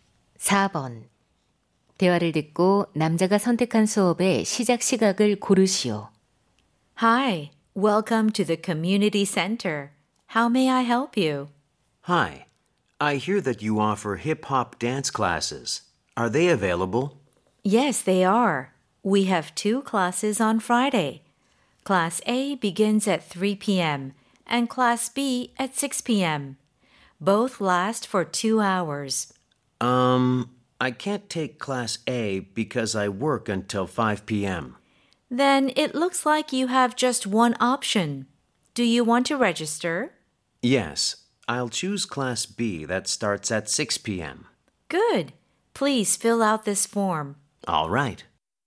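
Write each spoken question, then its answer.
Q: 대화를 듣고 남자가 선택한 수업의 시작 시각을 고르시오.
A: 오후 6시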